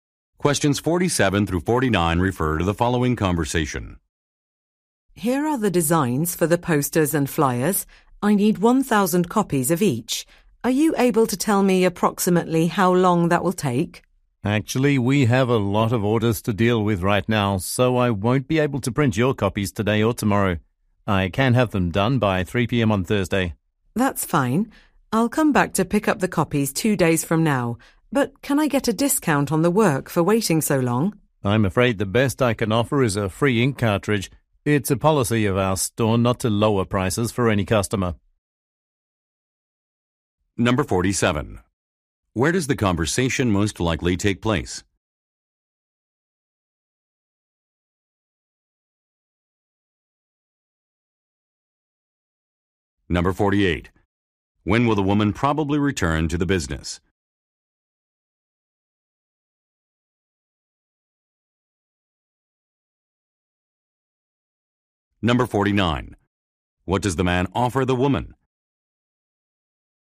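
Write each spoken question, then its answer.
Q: Where does the conversation most likely take place?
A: At a print shop

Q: When will the woman probably return to the business?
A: On Thursday

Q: What does the man offer the woman?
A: A free ink cartridge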